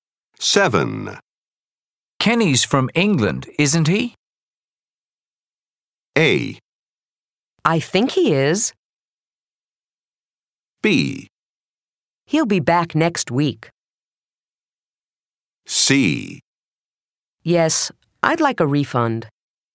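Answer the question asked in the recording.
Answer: A: I think he is.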